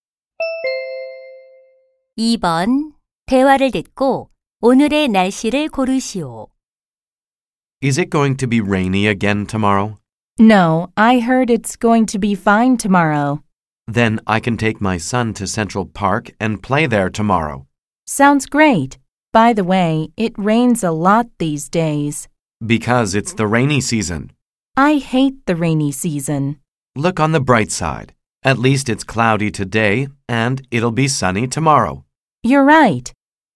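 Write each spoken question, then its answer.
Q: 대화를 듣고 오늘의 날씨를 고르시오.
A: 흐림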